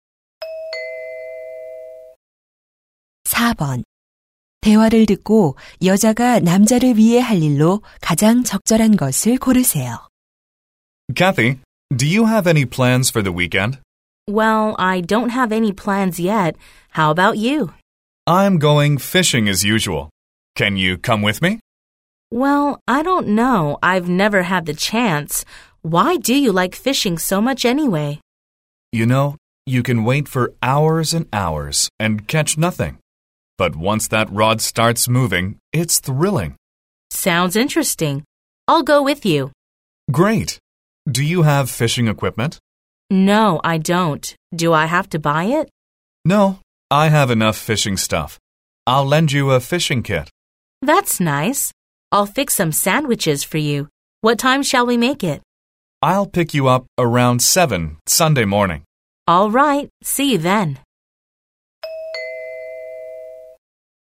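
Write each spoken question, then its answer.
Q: 대화를 듣고 여자가 남자를 위해 할 일로 가장 적절한 것을 고르세요.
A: 샌드위치 만들기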